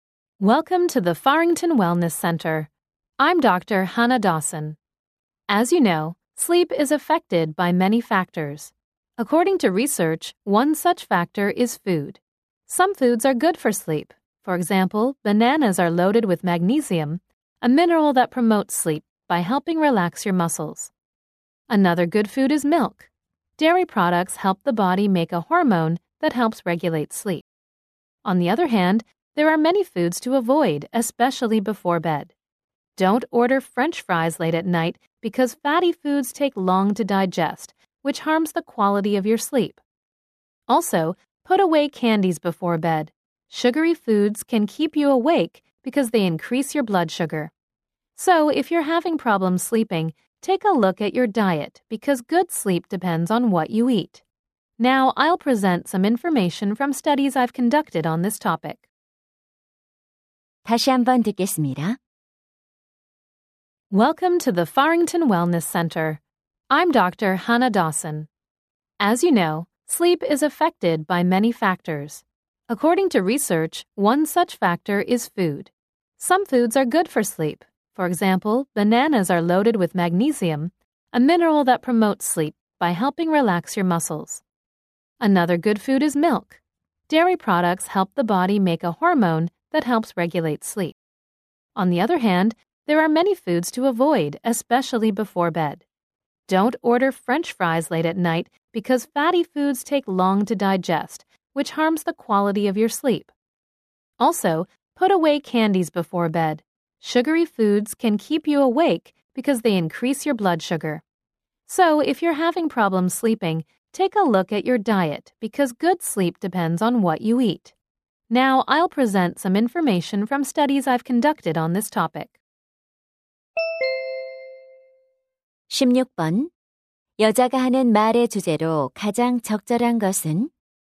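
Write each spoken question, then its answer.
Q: 여자가 하는 말의 주제로 가장 적절한 것은?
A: 수면에 영향을 미치는 음식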